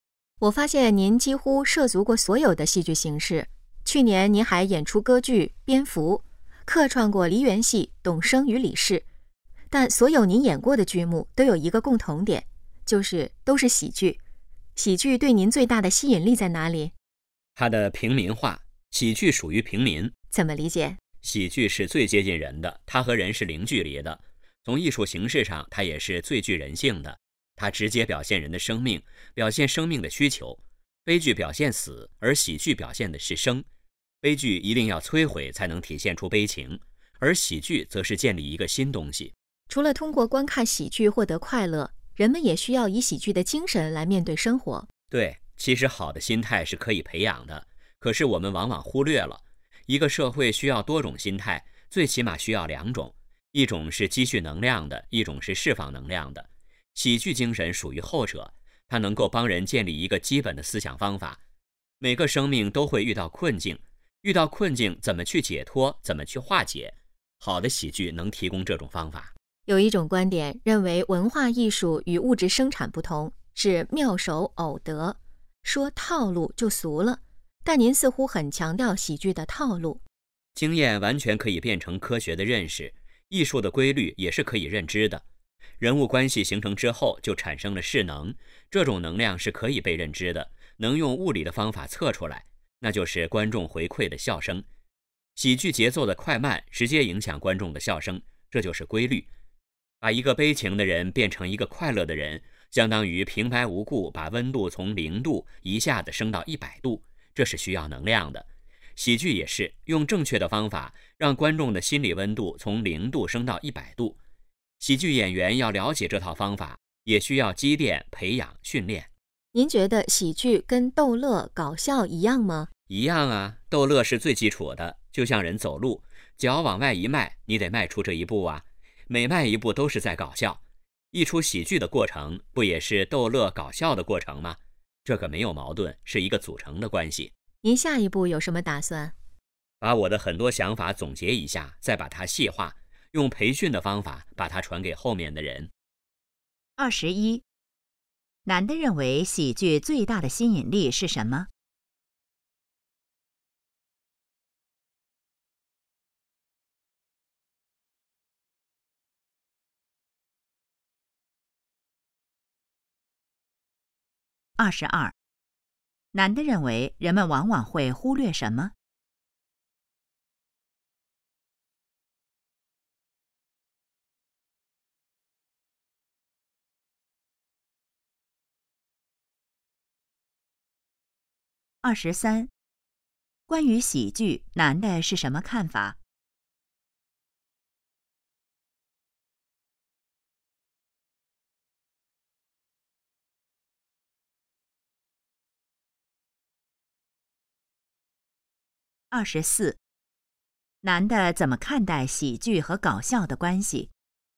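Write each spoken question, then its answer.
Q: 男的认为喜剧最大的吸引力是什么?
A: 它的平民化

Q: 男的认为人们往往会忽略什么?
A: 好的心态是可以培养的

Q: 男的怎么看待喜剧和搞笑的关系?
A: 不矛盾,是组成的关系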